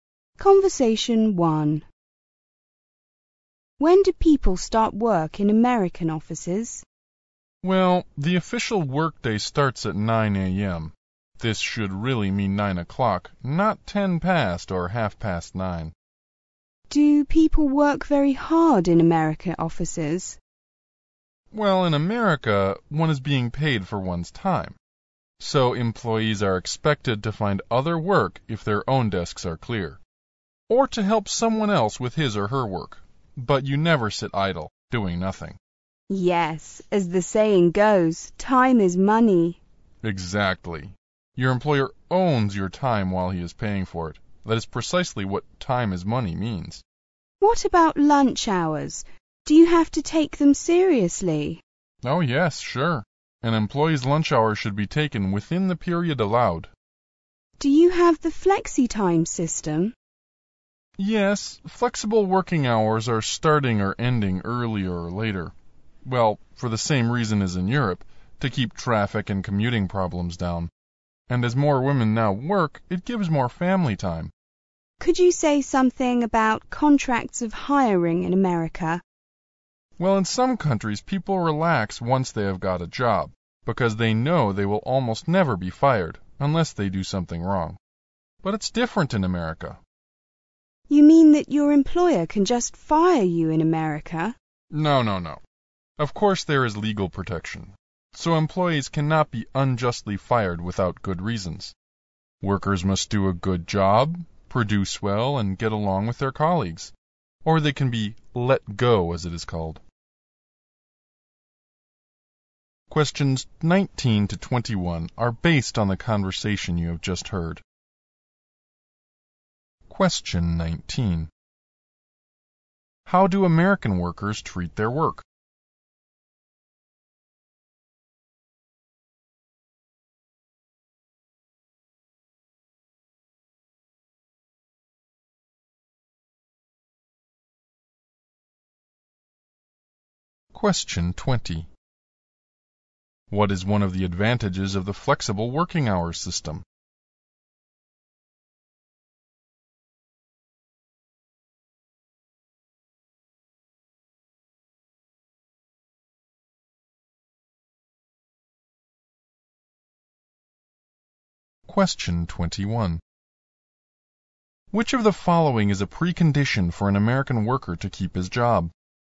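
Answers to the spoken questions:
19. They work hard and never sit idle
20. It reduces traffic and commuting problems
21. Doing a good job, producing well and getting along with colleagues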